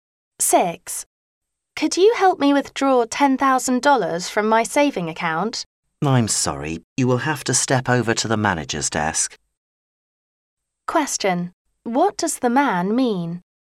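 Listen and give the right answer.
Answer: The woman has to go to the manager's desk to withdraw the money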